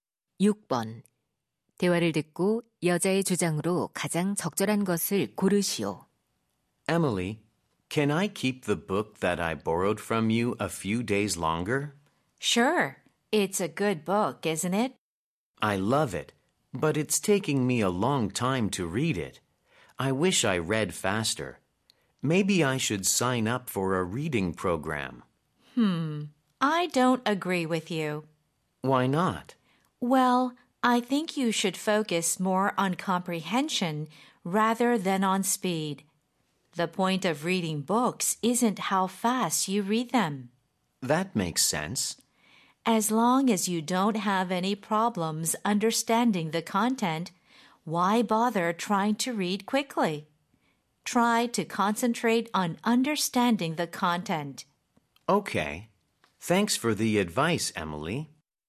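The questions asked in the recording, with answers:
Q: 대화를 듣고 여자의 주장으로 가장 적절한 것을 고르시오.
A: 책은 빨리 읽기보다 내용 이해에 집중해야 한다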